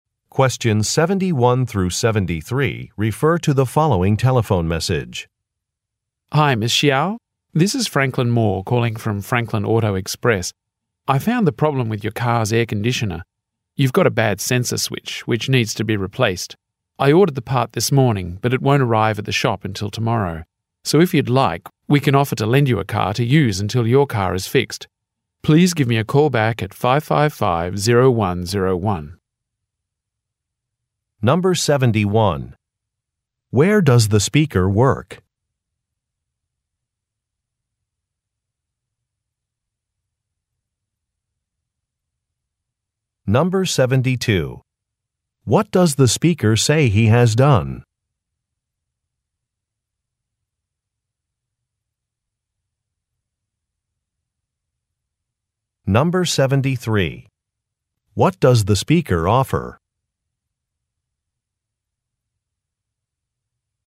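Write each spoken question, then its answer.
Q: Where does the speaker work?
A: At an auto repair shop (Franklin Auto Express)

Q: What does the speaker say he has done?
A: He ordered a replacement part (sensor switch)

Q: What does the speaker offer?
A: To lend her a car until hers is fixed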